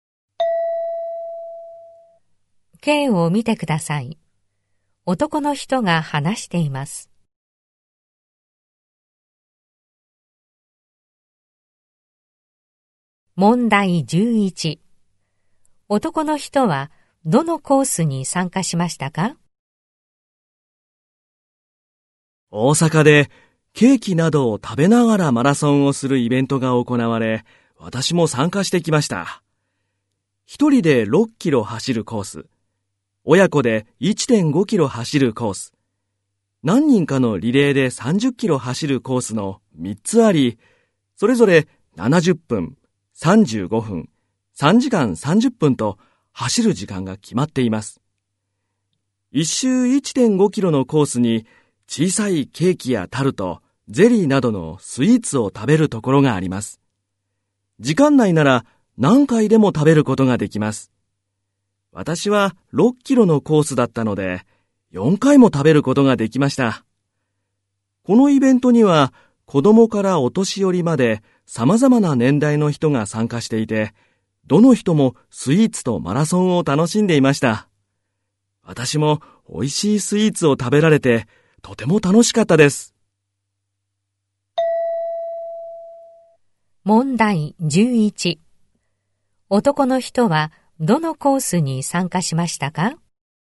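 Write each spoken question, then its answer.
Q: 男の人は、どのコースに参加しましたか?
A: 一人で6キロ走るコース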